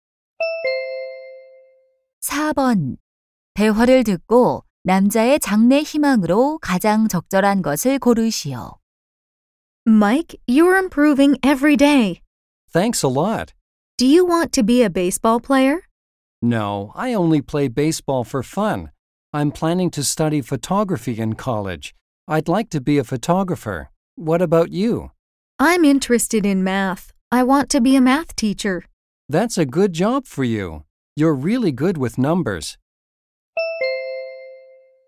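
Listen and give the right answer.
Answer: 사진작가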